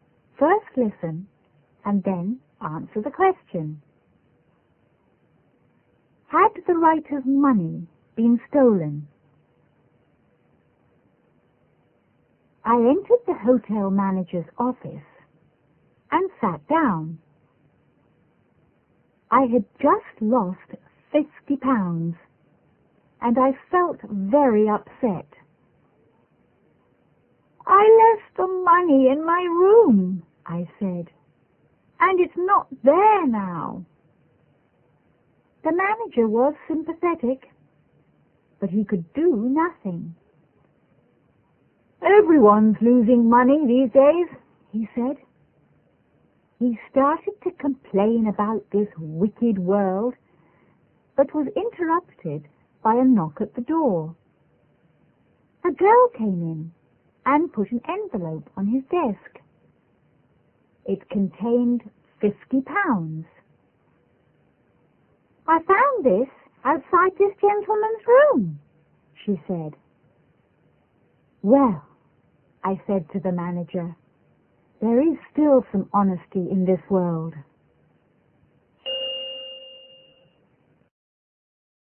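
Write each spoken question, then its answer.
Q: Had the writer's money been stolen?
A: No, it hadn't. He had left it outside his room and a girl found it.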